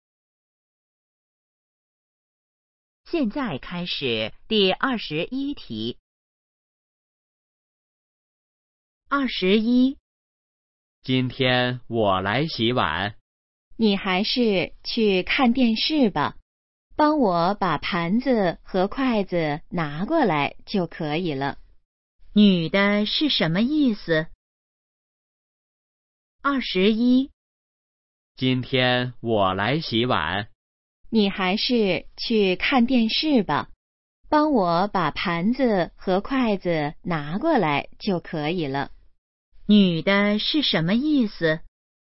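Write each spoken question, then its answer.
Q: 女的是什么意思?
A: 让男的去看电视,她来洗碗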